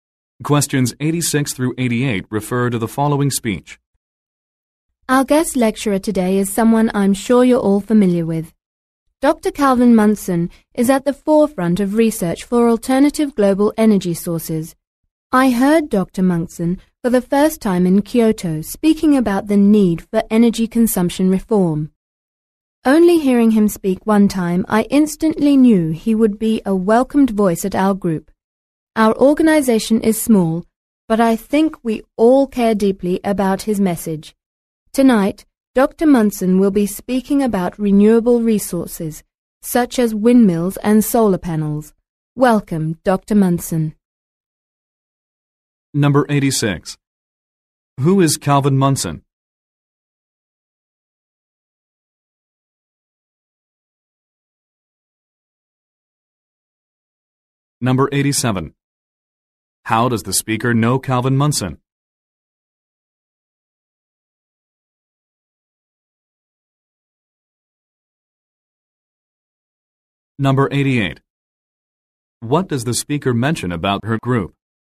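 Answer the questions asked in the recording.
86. A researcher of alternative energy sources
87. She heard him speak in Kyoto
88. It is small but cares deeply about his message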